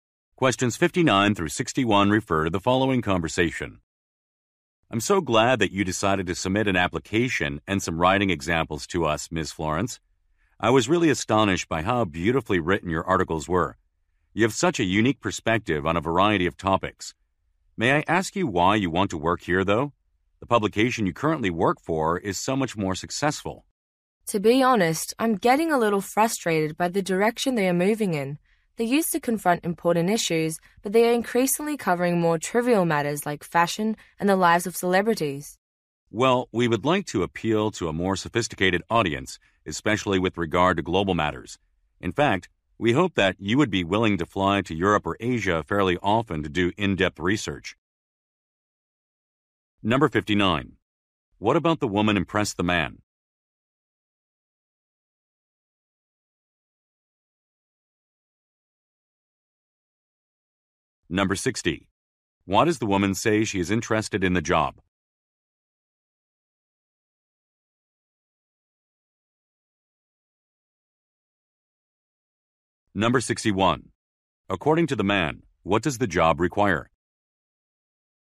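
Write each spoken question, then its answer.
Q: What about the woman impressed the man?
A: Her beautifully written articles

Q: Why does the woman say she is interested in the job?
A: Her current publication covers more trivial matters

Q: According to the man, what does the job require?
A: Frequent travel to Europe or Asia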